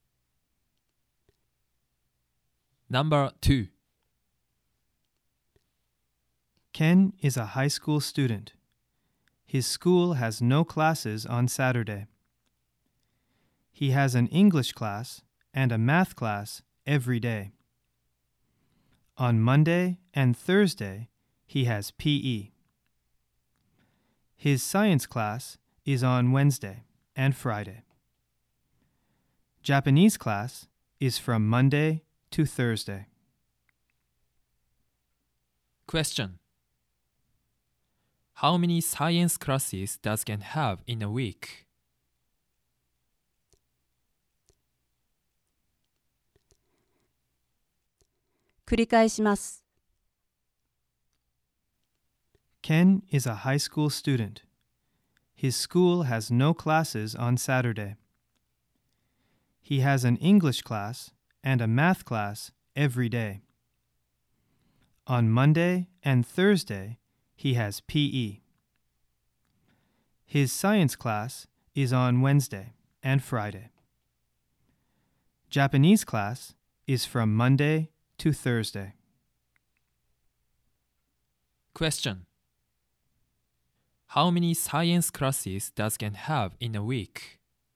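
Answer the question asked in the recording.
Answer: Two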